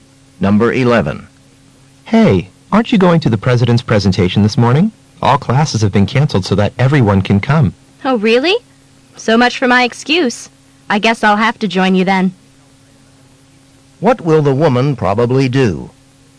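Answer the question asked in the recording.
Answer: Go to the president's presentation.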